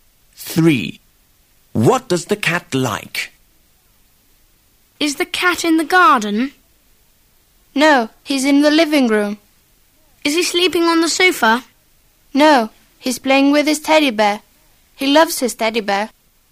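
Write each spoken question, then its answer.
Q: What does the cat like?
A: His teddy bear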